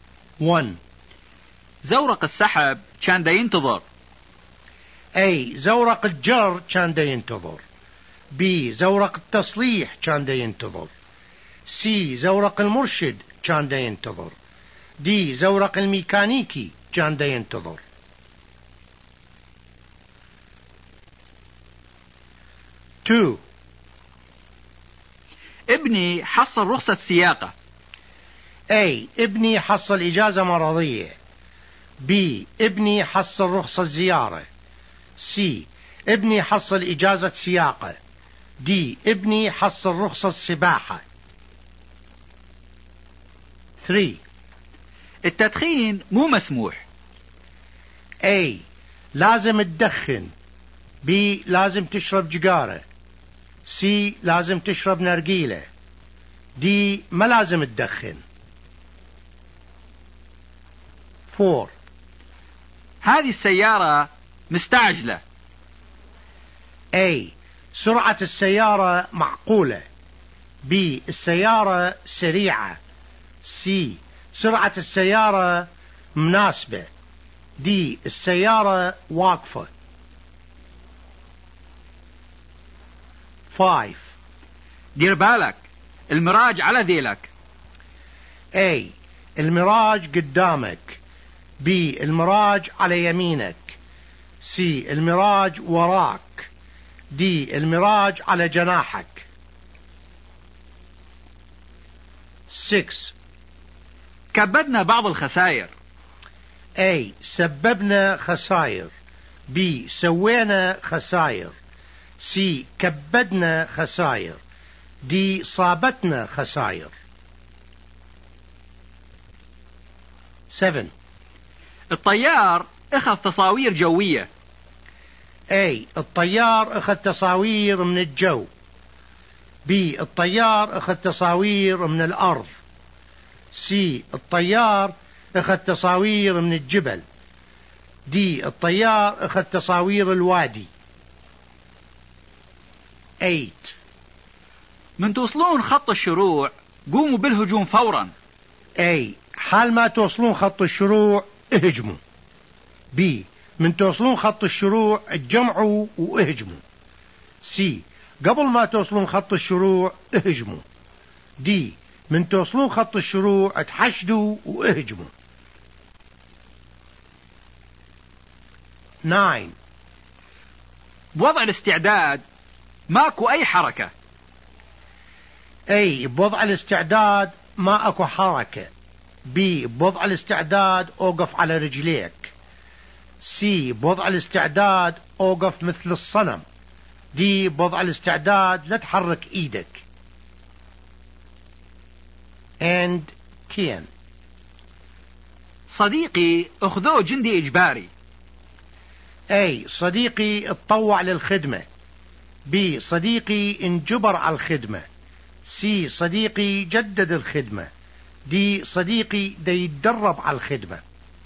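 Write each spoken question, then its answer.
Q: زورق السحب كان دا ينتظر.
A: A: زورق الجر كان دا ينتظر.

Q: ابني حصل رخصة سياقة.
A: C: ابني حصل إجازة سياقة.

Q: التدخين مو مسموح.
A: D: ما لازم تدخن.

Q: هذه السيارة مستعجلة.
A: B: السيارة سريعة.

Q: دير بالك المراج على ذيلك.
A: C: المراج وراك.

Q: الطيار اخذ تصاوير جوية.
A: A: الطيار اخذ تصاوير من الجو.

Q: من توصلون خط الشروع قوموا بالهجوم فورا.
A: A: حال ما توصلون خط الشروع اهجموا.

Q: صديقي أخذوه جندي إجباري.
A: B: صديقي انجبر على الخدمة.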